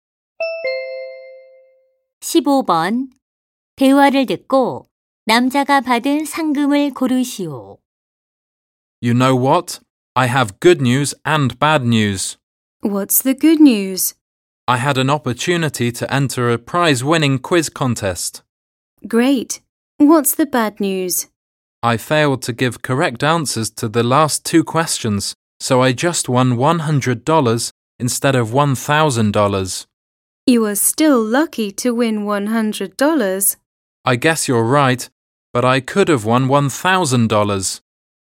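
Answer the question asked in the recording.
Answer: 100달러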